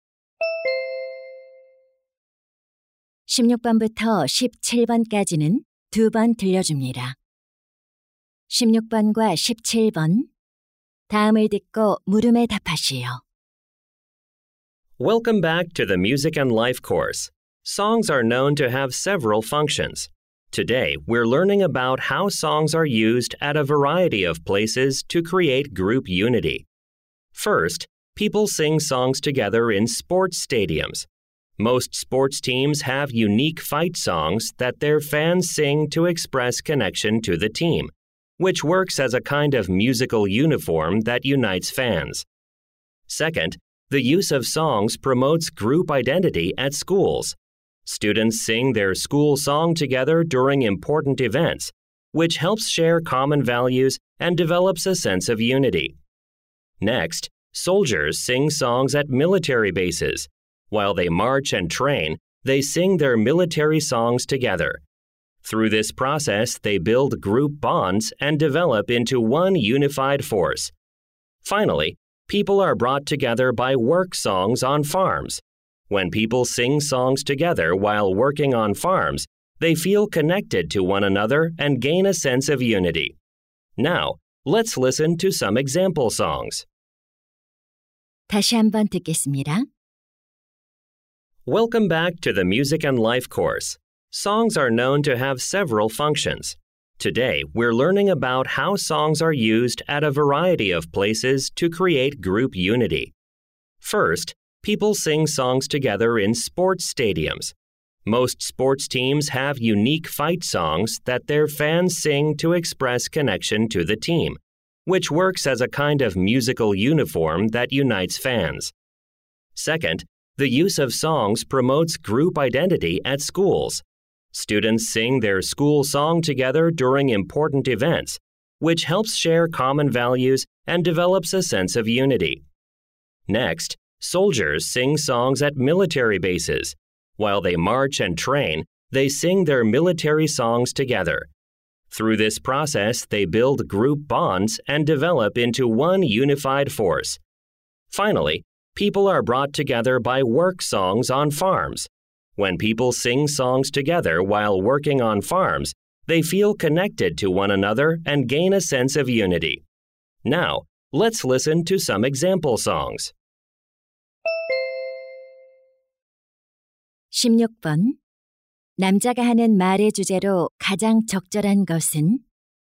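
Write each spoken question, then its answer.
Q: 남자가 하는 말의 주제로 가장 적절한 것은?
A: 여러 장소에서 집단의 단결을 만들기 위해 노래가 사용되는 방식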